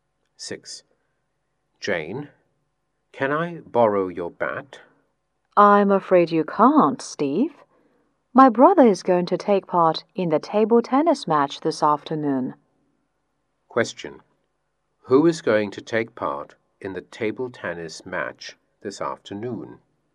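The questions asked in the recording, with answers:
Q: Who is going to take part in the table tennis match this afternoon?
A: Jane's brother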